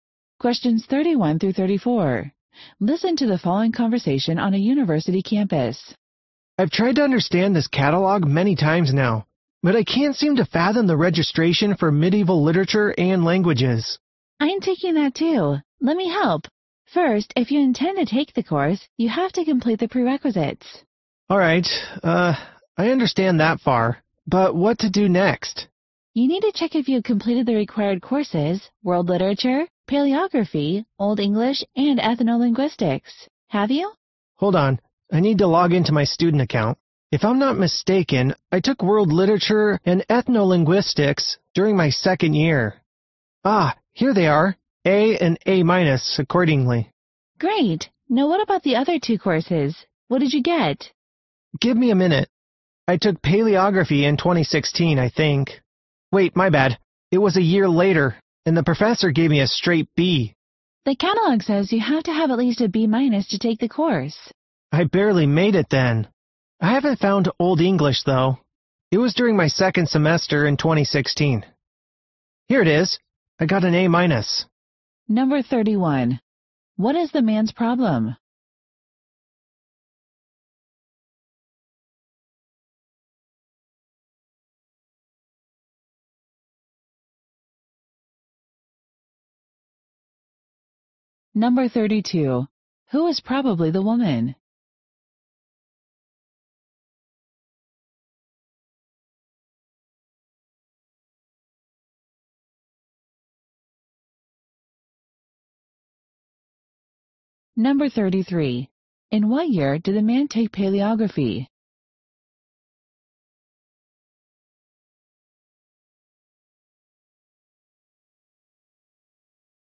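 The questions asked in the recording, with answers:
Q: What is the man's problem?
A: He can't understand how to register for the medieval literature and languages course

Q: Who is probably the woman?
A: A fellow student taking the same course

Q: In what year did the man take paleography?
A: 2017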